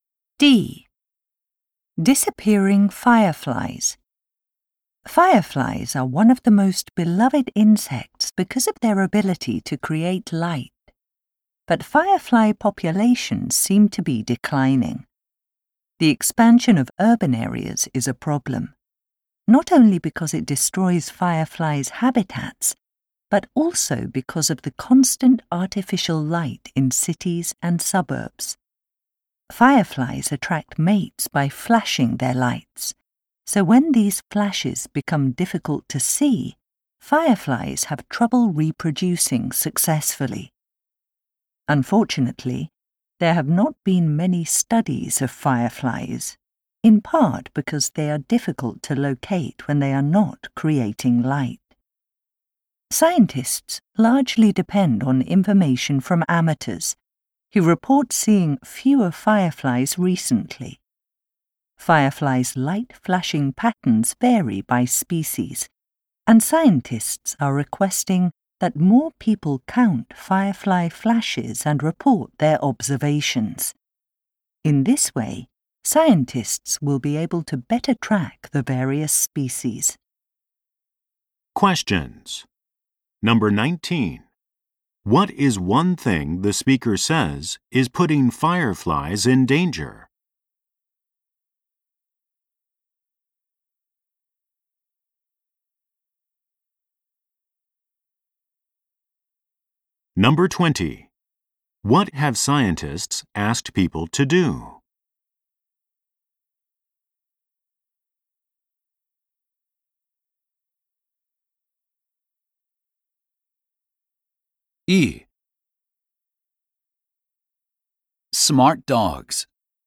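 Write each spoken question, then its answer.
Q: What is one thing the speaker says is putting fireflies in danger?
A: Artificial light from expanding urban areas

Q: What have scientists asked people to do?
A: Count firefly flashes and report their observations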